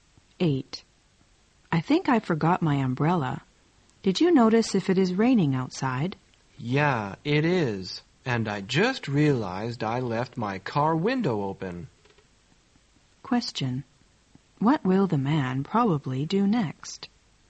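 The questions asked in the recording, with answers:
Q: What will the man probably do next?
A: Go and close his car window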